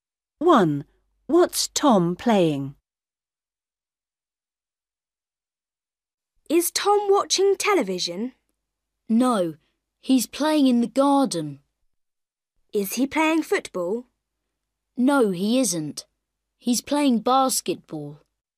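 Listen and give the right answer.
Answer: basketball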